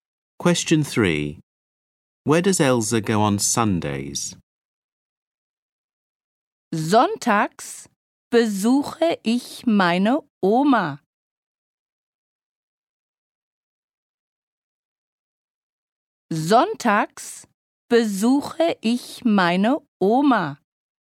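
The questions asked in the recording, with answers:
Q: Where does Elsa go on Sundays?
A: To visit her grandma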